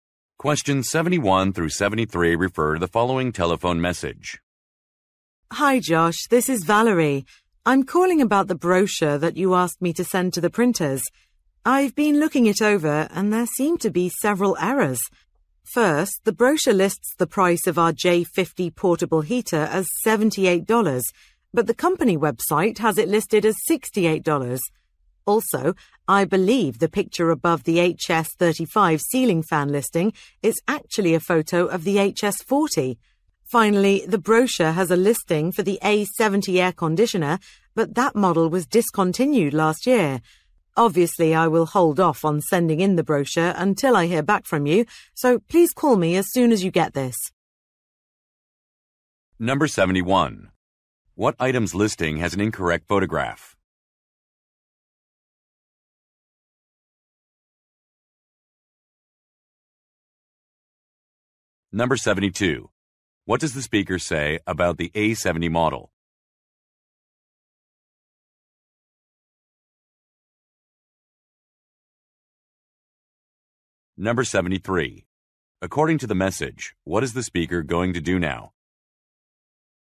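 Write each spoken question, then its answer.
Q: What item's listing has an incorrect photograph?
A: The HS35 ceiling fan

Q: What does the speaker say about the A70 model?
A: It was discontinued last year

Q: According to the message, what is the speaker going to do now?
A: Wait to hear back from Josh before sending the brochure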